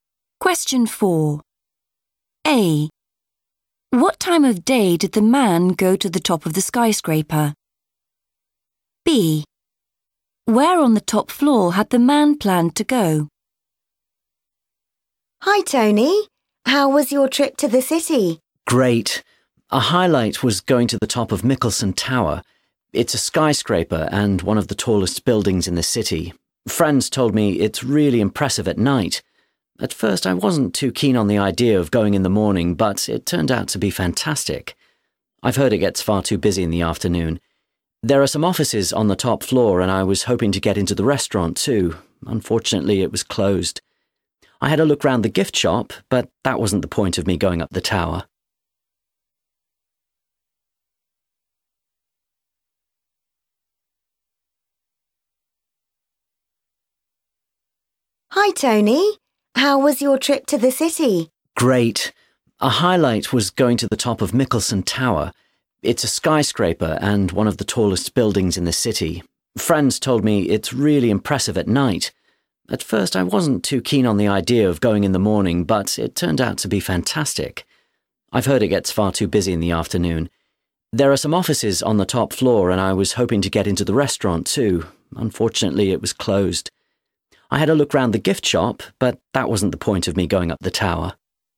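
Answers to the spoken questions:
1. in the morning
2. the restaurant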